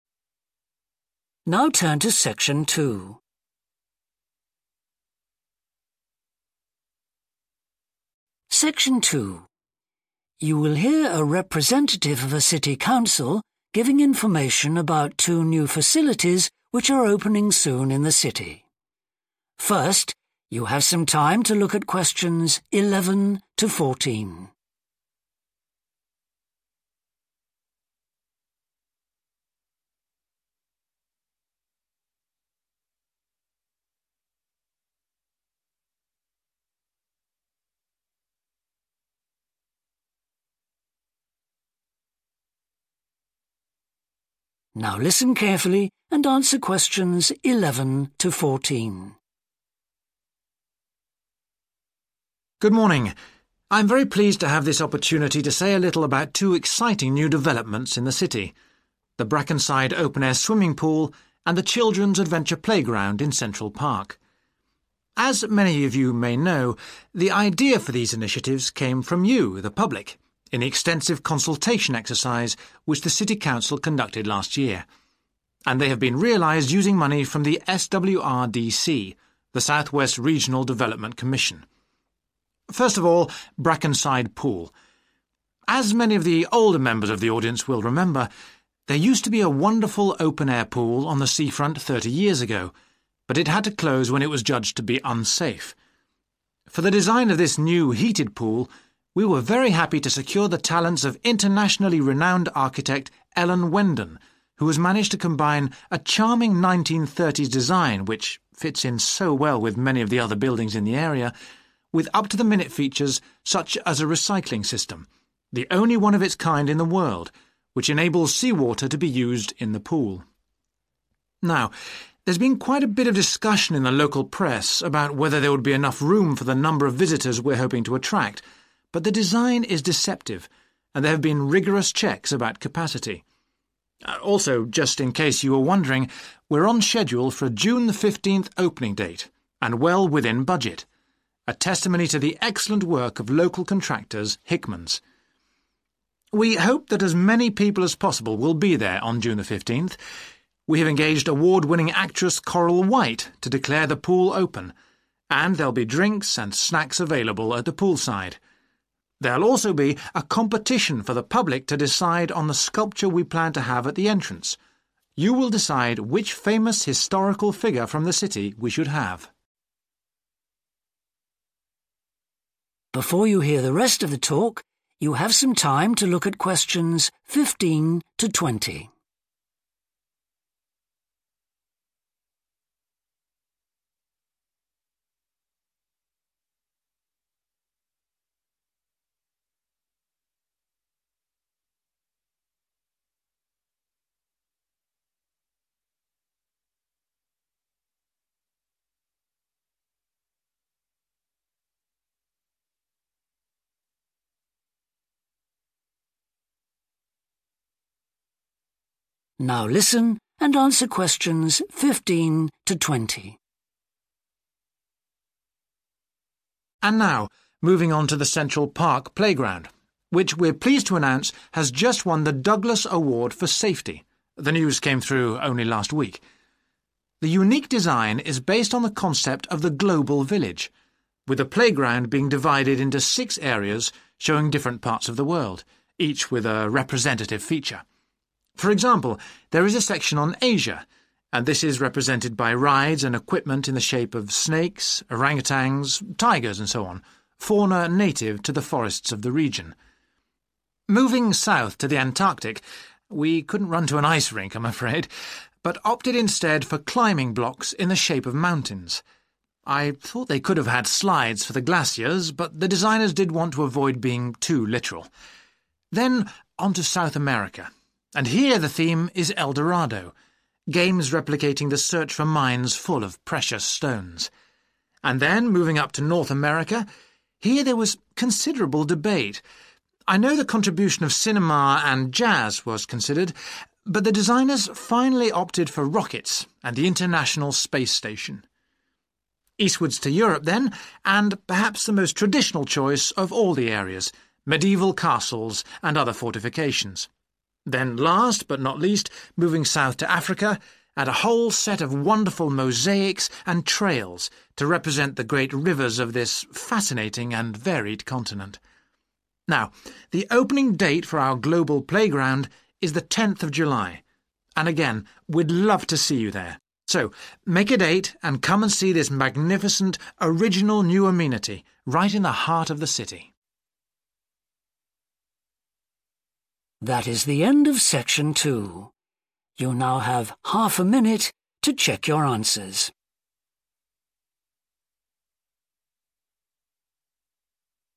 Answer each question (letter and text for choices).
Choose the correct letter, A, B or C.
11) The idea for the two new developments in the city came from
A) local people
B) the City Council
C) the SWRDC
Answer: A) local people

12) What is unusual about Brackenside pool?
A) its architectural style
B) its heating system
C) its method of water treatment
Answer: C) its method of water treatment

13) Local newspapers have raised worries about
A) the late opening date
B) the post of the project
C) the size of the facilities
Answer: C) the size of the facilities

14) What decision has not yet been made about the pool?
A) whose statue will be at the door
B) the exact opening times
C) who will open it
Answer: A) whose statue will be at the door

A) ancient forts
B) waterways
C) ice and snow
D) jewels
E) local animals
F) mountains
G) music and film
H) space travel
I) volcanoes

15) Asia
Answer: E) local animals

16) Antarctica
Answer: F) mountains

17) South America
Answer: D) jewels

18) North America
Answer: H) space travel

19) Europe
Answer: A) ancient forts

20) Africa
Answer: B) waterways